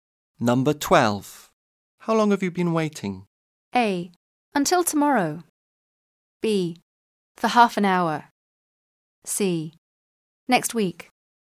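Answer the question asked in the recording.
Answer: B: For half an hour.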